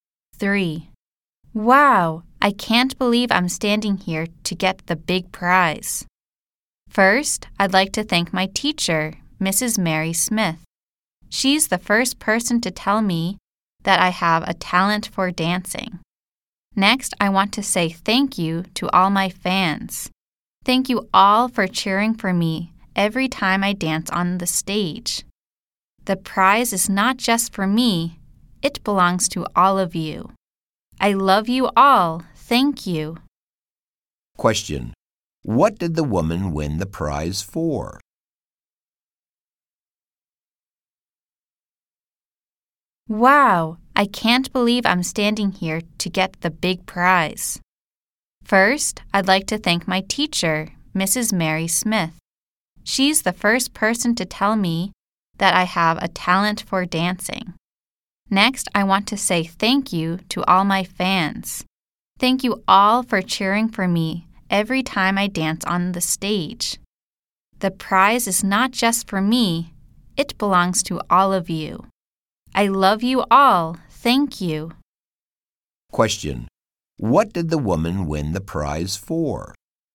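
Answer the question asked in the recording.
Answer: For dancing.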